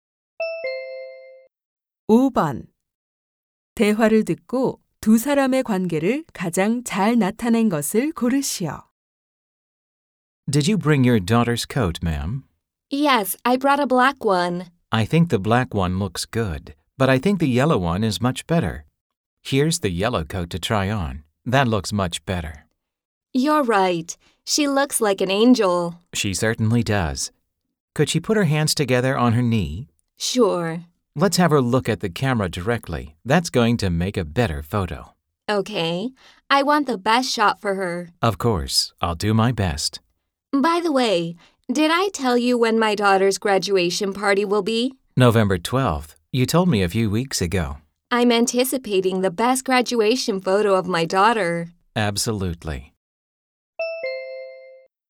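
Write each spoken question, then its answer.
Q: 대화를 듣고 두 사람의 관계를 가장 잘 나타낸 것을 고르시오.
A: 사진사 - 고객(학부모)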